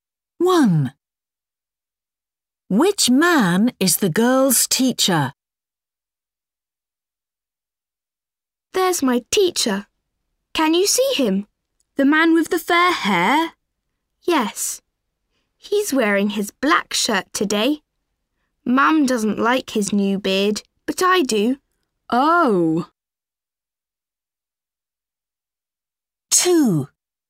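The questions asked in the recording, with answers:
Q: Which man is the girl's teacher?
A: The man with fair hair, a black shirt and a beard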